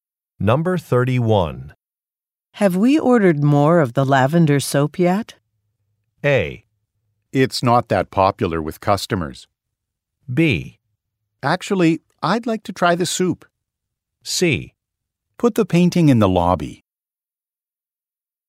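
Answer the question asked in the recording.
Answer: A: It's not that popular with customers.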